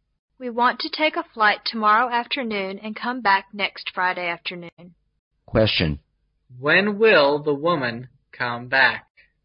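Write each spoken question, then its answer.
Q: When will the woman come back?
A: Next Friday afternoon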